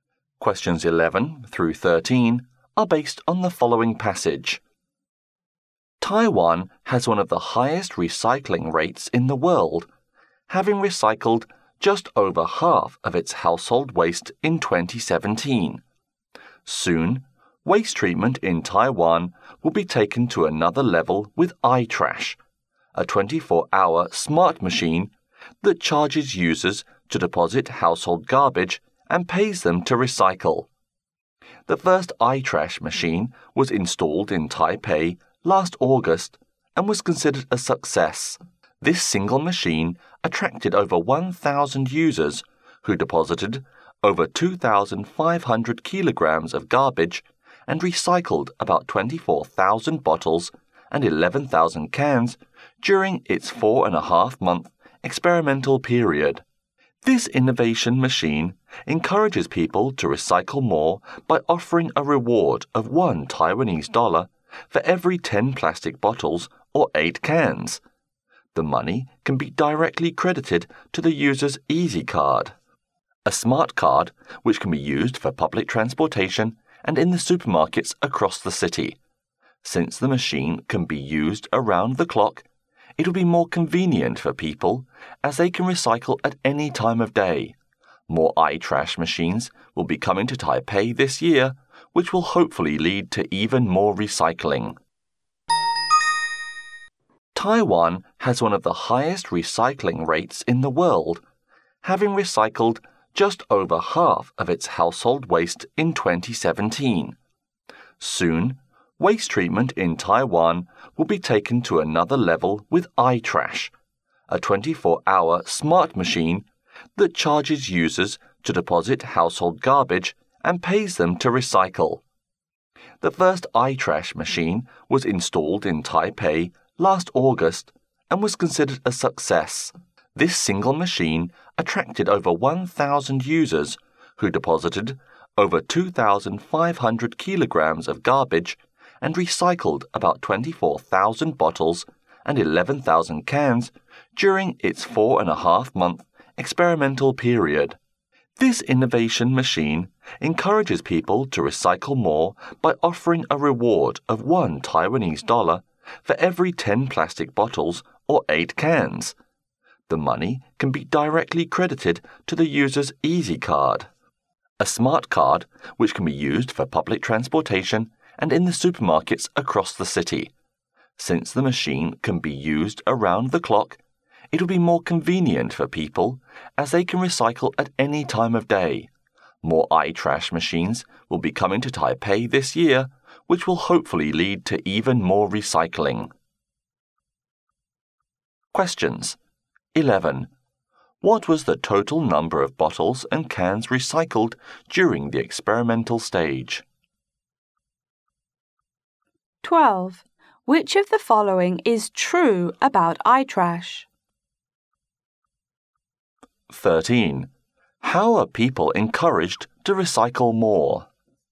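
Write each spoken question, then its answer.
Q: What was the total number of bottles and cans recycled during the experimental stage?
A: About 35,000

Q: How are people encouraged to recycle more?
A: By getting $1 for every 10 plastic bottles or 8 cans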